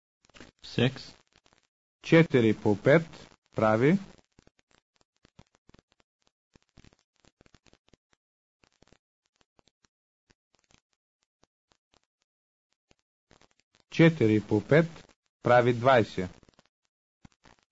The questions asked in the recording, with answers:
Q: 4 по 5 прави.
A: 4 по 5 прави 20.